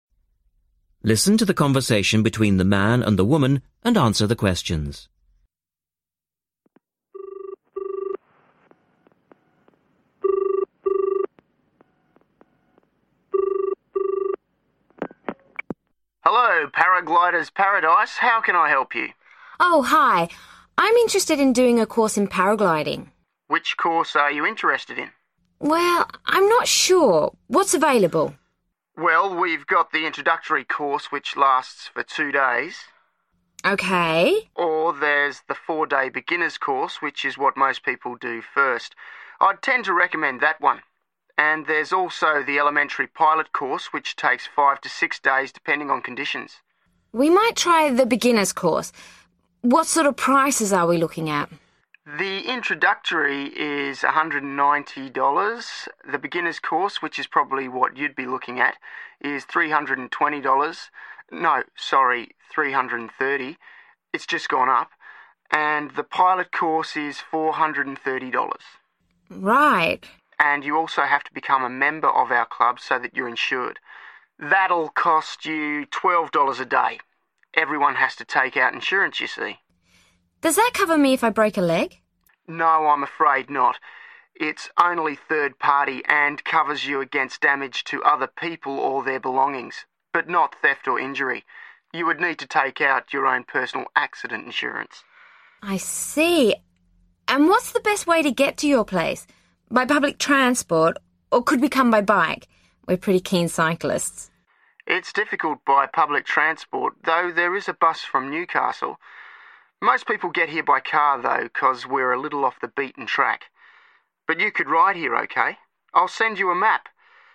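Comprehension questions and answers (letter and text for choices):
Choose the correct letters A-D.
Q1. How much is the beginner's course?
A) $190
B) $320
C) $330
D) $430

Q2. What does the club insurance cover?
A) injury to yourself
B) injury to your equipment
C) damage to other people's property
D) loss of personal belongings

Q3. How do the girls want to travel?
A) public transport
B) private bus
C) car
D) bicycle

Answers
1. C) $330
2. C) damage to other people's property
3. D) bicycle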